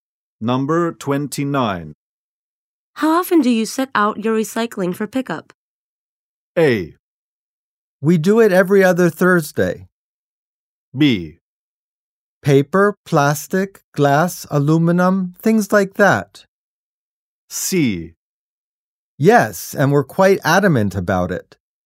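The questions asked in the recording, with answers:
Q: How often do you set out your recycling for pickup?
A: A: We do it every other Thursday.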